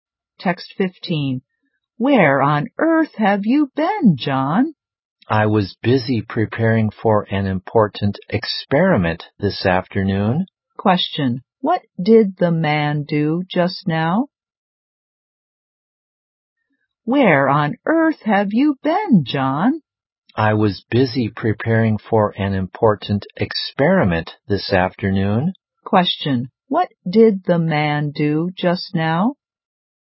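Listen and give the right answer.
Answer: He was preparing for an important experiment.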